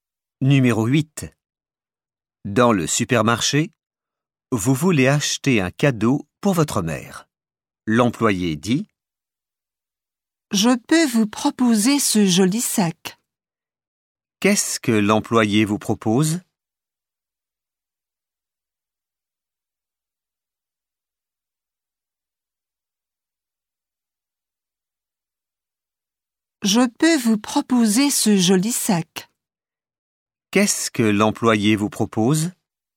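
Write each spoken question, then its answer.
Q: Qu'est-ce que l'employé vous propose?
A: Un joli sac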